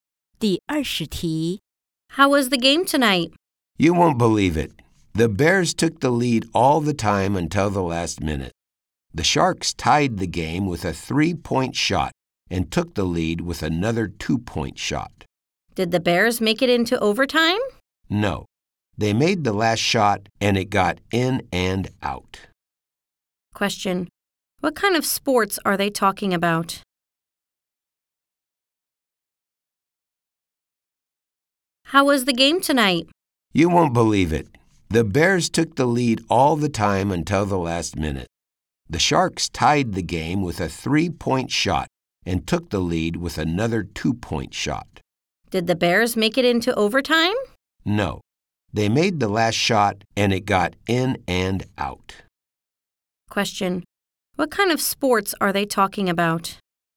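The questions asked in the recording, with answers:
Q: What kind of sports are they talking about?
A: Basketball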